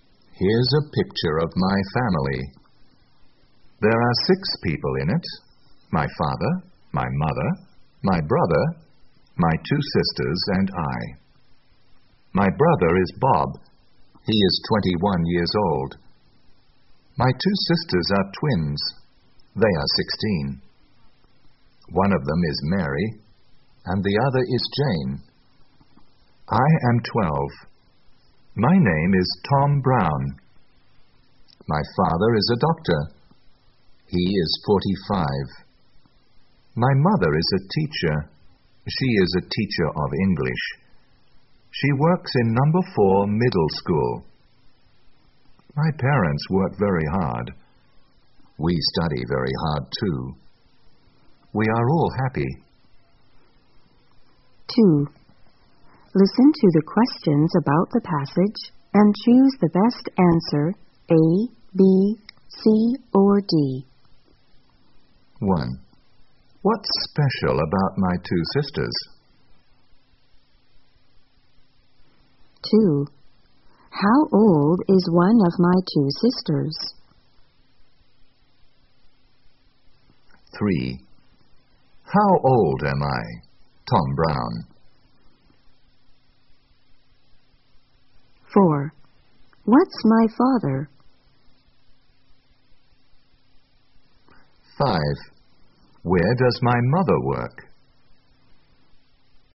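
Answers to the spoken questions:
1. They are twins
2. 16
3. 12
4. A doctor
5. In number 4 middle school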